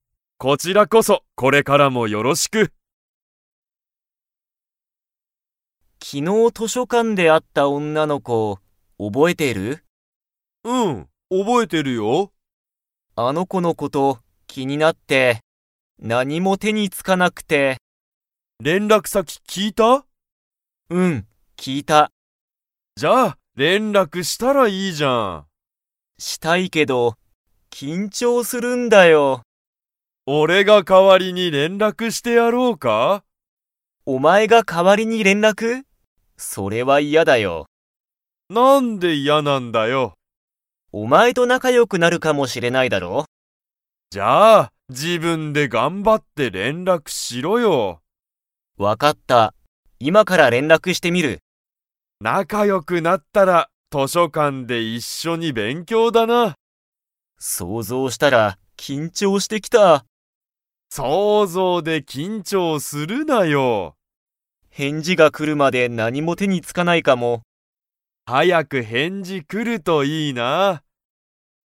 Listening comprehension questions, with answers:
Comprehension Quiz (Skip if you don't understand the conversation yet)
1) けいごは、気きになる女おんなの子こに何なにを聞ききましたか?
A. 図書館としょかんの場所ばしょ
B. 連絡れんらく先さき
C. 本ほんの名前なまえ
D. 仕事しごと内容ないよう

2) けいごは、気きになる女おんなの子こに連絡れんらく 。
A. してみる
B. してみない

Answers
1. B
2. A

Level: Level 4

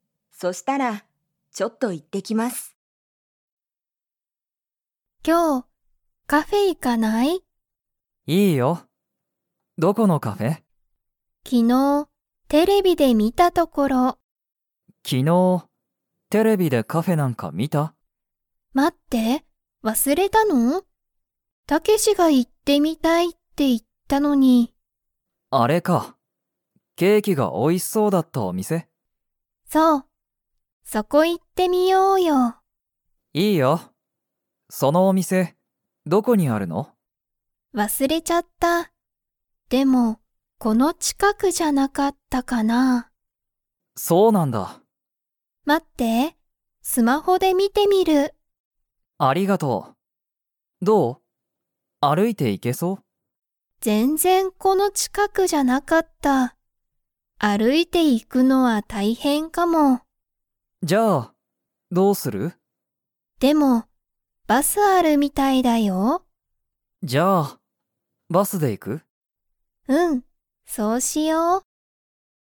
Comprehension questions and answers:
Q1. そのカフェは、____が美味おいしそうだった。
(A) コーヒー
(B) ラーメン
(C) パスタ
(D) ケーキ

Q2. リカとタケシは、歩あるいてカフェに行いきますか?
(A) はい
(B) いいえ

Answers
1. D
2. B

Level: Level 2

